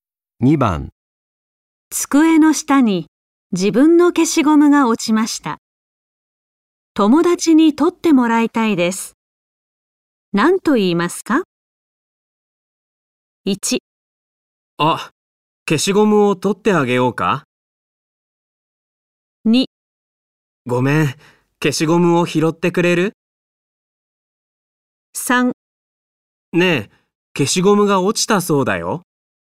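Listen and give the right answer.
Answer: 2: ごめん、消しゴムを拾ってくれる?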